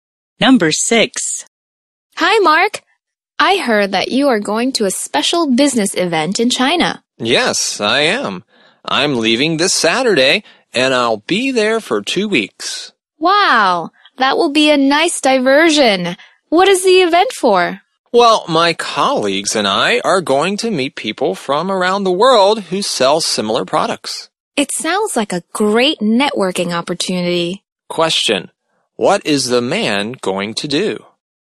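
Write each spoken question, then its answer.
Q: What is the man going to do?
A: Go to a business networking event in China for 2 weeks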